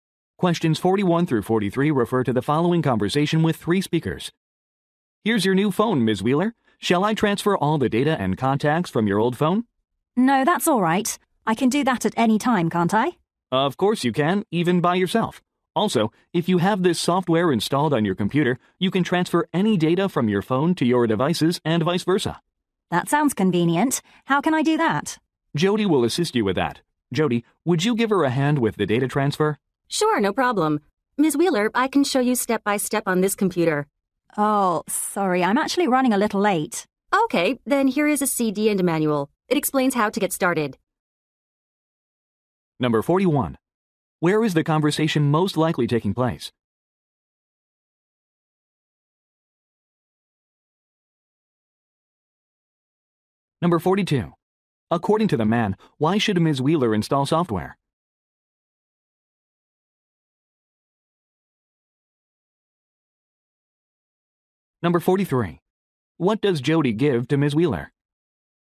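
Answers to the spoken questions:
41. At a phone store
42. To transfer data between her phone and devices
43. A CD and a manual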